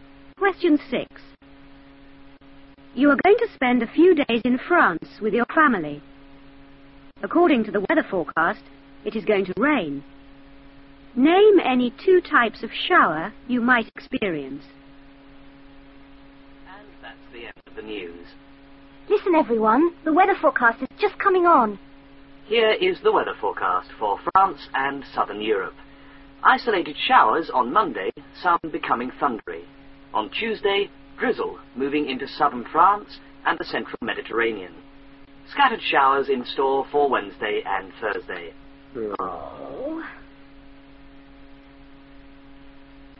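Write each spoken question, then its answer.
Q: Name any 2 types of shower you might experience.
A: Any two of: isolated, thundery, scattered showers (or drizzle)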